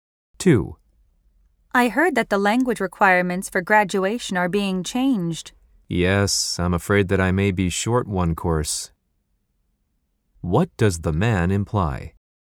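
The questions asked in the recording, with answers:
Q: What does the man imply?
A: He may need one more course to graduate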